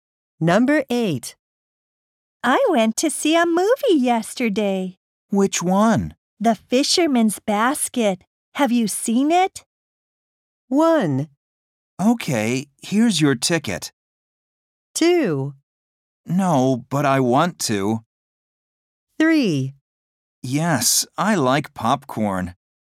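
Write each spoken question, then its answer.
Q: The Fisherman's Basket. Have you seen it?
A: 2: No, but I want to.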